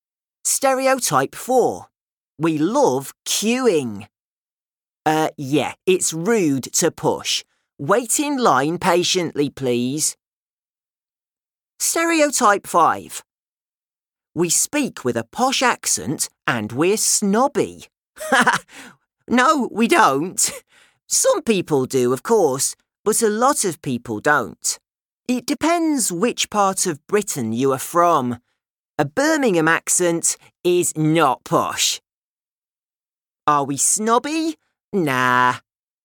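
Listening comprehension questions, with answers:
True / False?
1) The British like lines.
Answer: True

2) Josh speaks with a posh accent.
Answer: False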